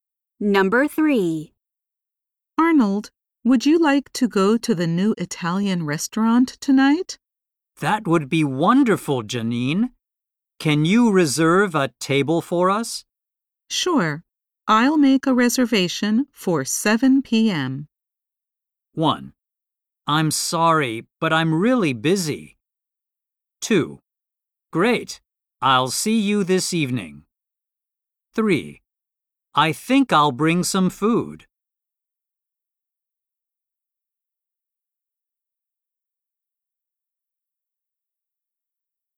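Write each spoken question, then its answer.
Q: Sure. I'll make a reservation for 7 p.m.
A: 2: Great. I'll see you this evening.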